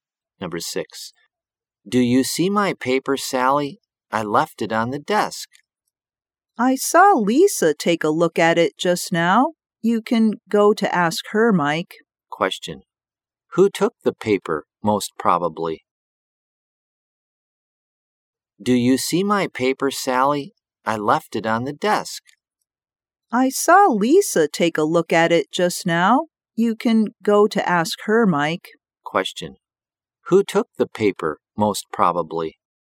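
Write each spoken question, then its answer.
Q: Who took the paper, most probably?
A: Lisa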